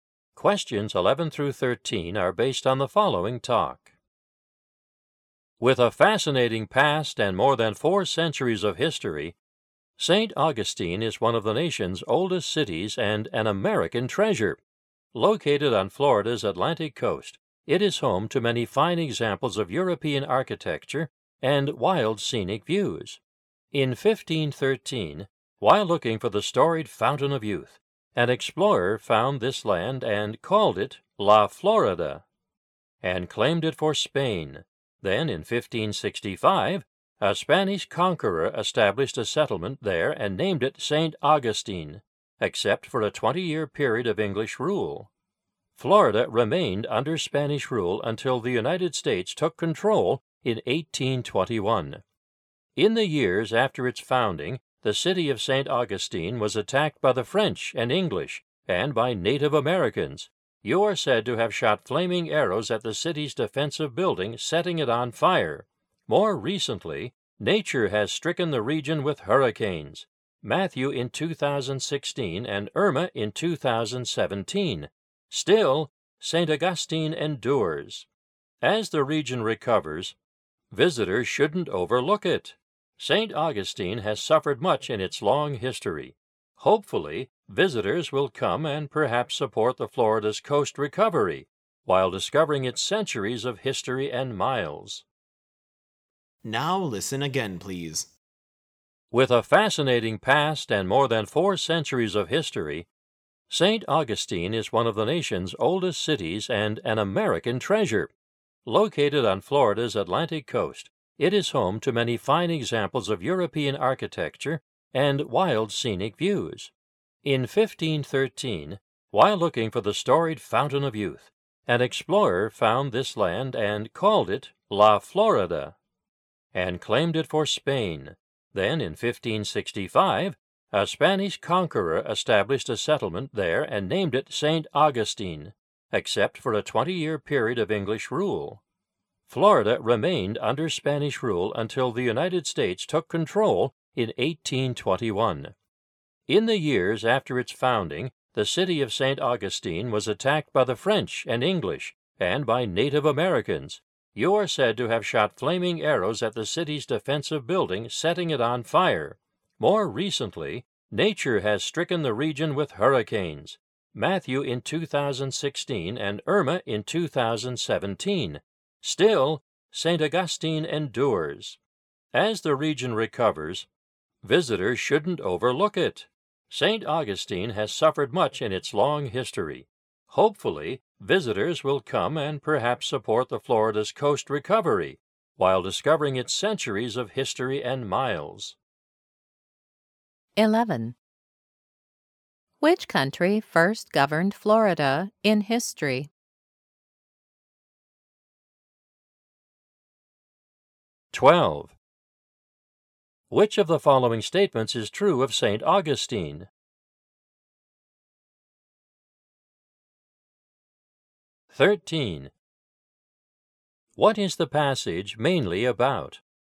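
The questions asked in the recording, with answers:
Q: Which country first governed Florida in history?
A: Spain

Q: What is the passage mainly about?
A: The history of St. Augustine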